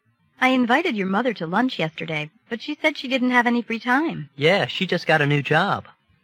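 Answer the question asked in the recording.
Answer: The mother is busy because she just started a new job.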